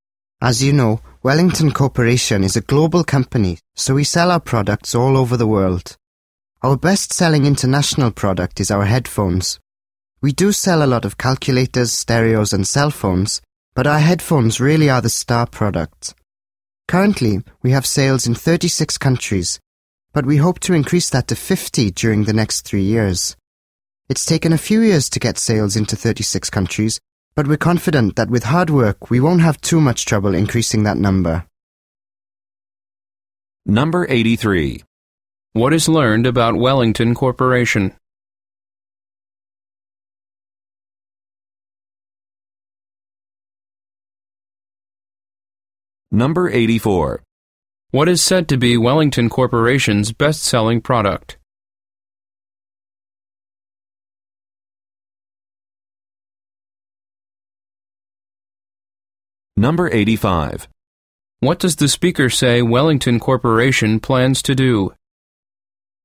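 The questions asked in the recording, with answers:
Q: What is said to be Wellington Corporation's best-selling product?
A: Headphones

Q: What does the speaker say Wellington Corporation plans to do?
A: Increase sales from 36 to 50 countries in the next 3 years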